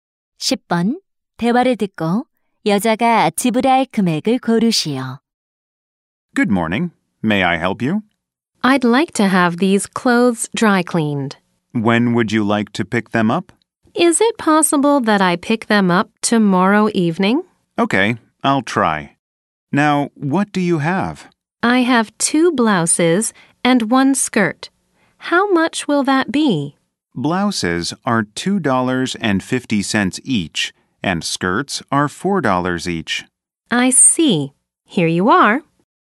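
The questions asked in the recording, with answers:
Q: 대화를 듣고 여자가 지불할 금액을 고르시오.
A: 9달러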